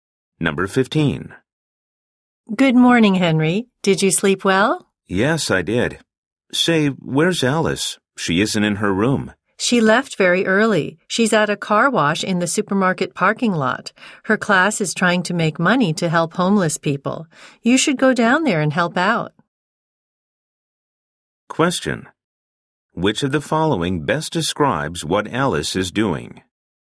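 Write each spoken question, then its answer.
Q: Which of the following best describes what Alice is doing?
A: Working at a car wash to raise money for homeless people.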